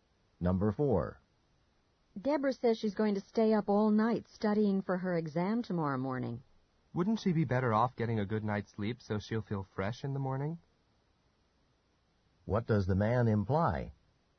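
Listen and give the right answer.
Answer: Deborah should sleep instead of studying all night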